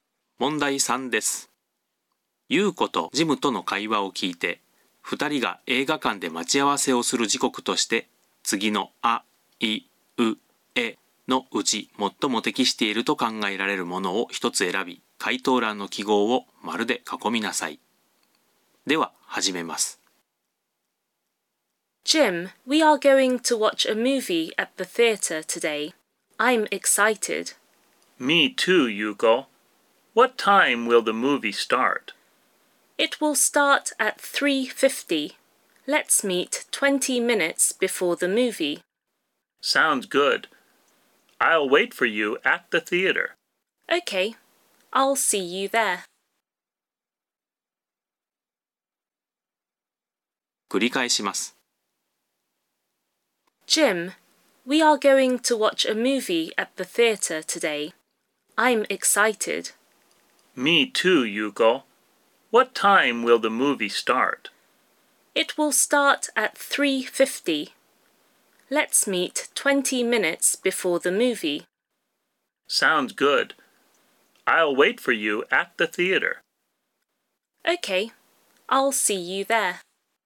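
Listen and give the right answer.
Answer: 3時30分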